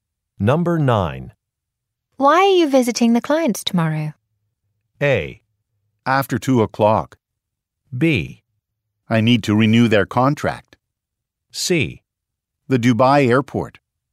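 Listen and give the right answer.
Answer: B: I need to renew their contract.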